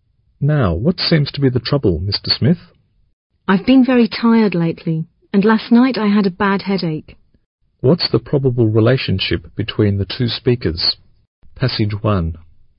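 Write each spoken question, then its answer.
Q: What's the probable relationship between the two speakers?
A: Doctor and patient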